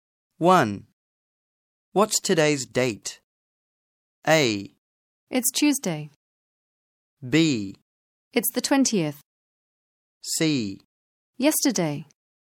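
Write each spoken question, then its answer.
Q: What's today's date?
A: B: It's the 20th.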